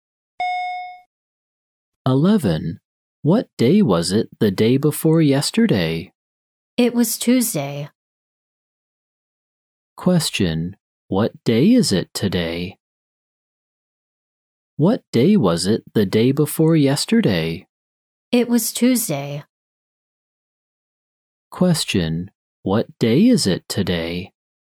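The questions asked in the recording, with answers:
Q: What day is it today?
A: Thursday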